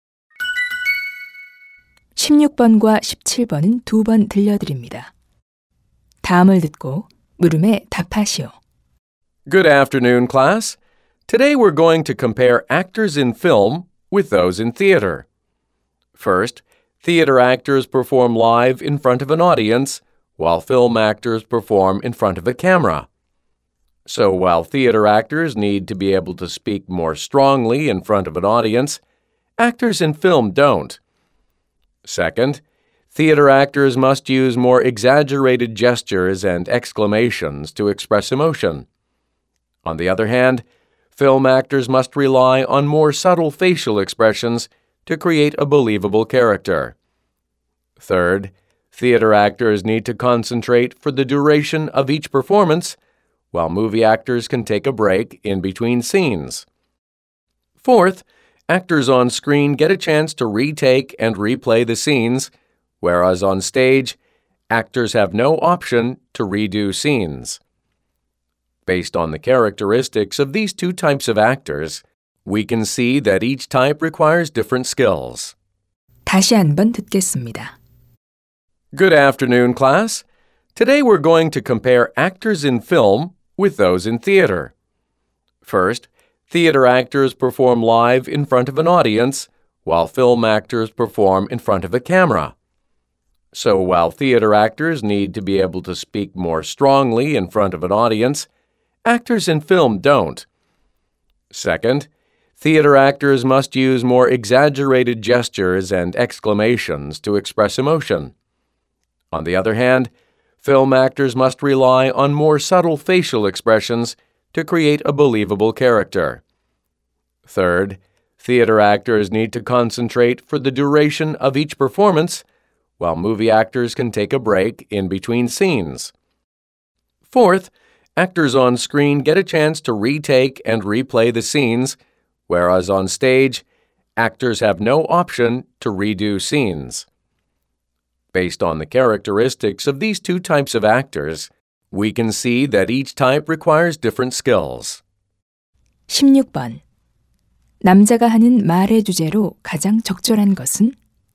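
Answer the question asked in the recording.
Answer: 영화배우와 연극배우의 차이점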